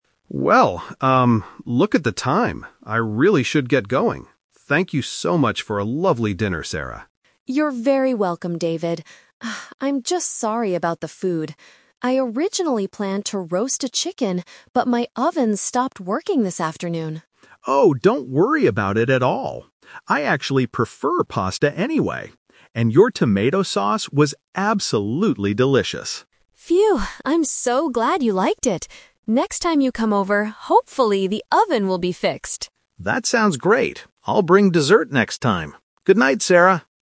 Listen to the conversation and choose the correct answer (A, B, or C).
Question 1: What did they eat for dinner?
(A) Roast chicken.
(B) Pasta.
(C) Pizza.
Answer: B

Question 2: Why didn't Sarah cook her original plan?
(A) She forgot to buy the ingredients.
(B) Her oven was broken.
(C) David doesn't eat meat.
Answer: B

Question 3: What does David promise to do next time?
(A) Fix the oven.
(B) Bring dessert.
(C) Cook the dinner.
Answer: B

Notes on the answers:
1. David says, "I actually prefer pasta anyway," which means that is what they ate. He also compliments her tomato sauce. Trap: Option (A) is the classic "Twist" trap. Sarah planned to make roast chicken, but she couldn't. Option (C) is a popular food, but it is not mentioned in the audio.
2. Sarah explains the problem by saying, "my oven stopped working this afternoon." Trap: Options (A) and (C) are plausible reasons for changing a dinner menu, but they are not mentioned in the conversation.
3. At the end of the conversation, David says, "I'll bring dessert next time." Trap: Option (A) is a trap because the word "oven" is mentioned when Sarah hopes it will be fixed, but David does not promise to fix it himself.

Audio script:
David: Well, um, look at the time. I really should get going. Thank you so much for a lovely dinner, Sarah.
Sarah: You're very welcome, David. Ah, I'm just sorry about the food. I originally planned to roast a chicken, but my oven stopped working this afternoon.
David: Oh, don't worry about it at all! I actually prefer pasta anyway. And your tomato sauce was absolutely delicious.
Sarah: Phew, I'm so glad you liked it. Next time you come over, hopefully, the oven will be fixed!
David: That sounds great. I'll bring dessert next time. Goodnight, Sarah!

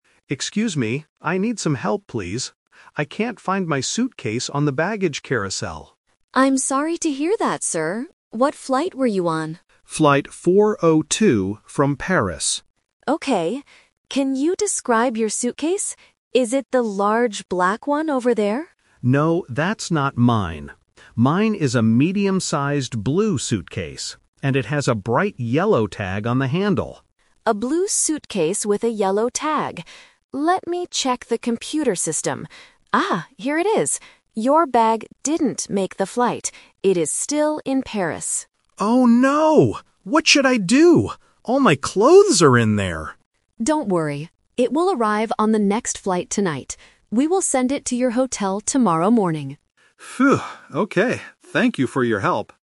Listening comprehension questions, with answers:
Listen to a conversation between a passenger and a lost luggage agent. Choose the correct answer (A, B, or C) for each question.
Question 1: What does the passenger's suitcase look like?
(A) It is large and black.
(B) It is blue with a yellow tag.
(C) It is yellow with a blue handle.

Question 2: Where is the passenger's suitcase right now?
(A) In Paris.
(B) On the baggage carousel.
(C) At his hotel.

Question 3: When will the passenger get his suitcase back?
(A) Right now.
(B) Tonight.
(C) Tomorrow morning.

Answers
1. B
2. A
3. C

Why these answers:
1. The passenger says, "Mine is a medium-sized blue suitcase. And it has a bright yellow tag." Option (A) is the trap; the agent asks if it is the large black one, but the passenger says no. Option (C) is a trap that mixes up the colors.
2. The agent checks the computer and says, "It is still in Paris." Option (B) is a trap; the baggage carousel is where the passenger expected it to be, but it wasn't there. Option (C) is where the suitcase will be sent later.
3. This is The Twist. The agent says the suitcase will arrive at the airport "tonight", but they will send it to the hotel "tomorrow morning." Option (C) is the time the passenger actually gets it. Option (B) is the trap for when the flight arrives.

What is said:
Passenger: Excuse me. I need some help, please. I can't find my suitcase on the baggage carousel.
Agent: I'm sorry to hear that, sir. What flight were you on?
Passenger: Flight 402 from Paris.
Agent: Okay. Can you describe your suitcase? Is it the large black one over there?
Passenger: No, that's not mine. Mine is a medium-sized blue suitcase. And it has a bright yellow tag on the handle.
Agent: A blue suitcase with a yellow tag... Let me check the computer system. Ah, here it is. Your bag didn't make the flight. It is still in Paris.
Passenger: Oh no! What should I do? All my clothes are in there!
Agent: Don't worry. It will arrive on the next flight tonight. We will send it to your hotel tomorrow morning.

